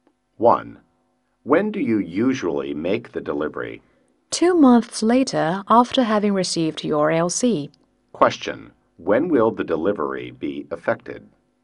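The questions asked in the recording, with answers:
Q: When will the delivery be effected?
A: 2 months after receiving the LC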